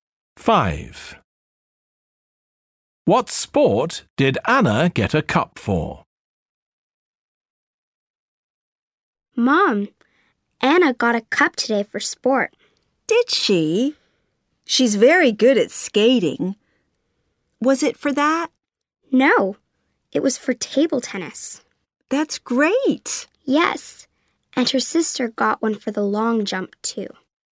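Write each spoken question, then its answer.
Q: What sport did Anna get a cup for?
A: Table tennis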